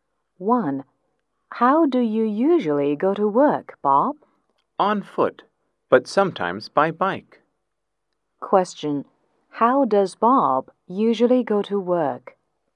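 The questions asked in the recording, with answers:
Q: How does Bob usually go to work?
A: On foot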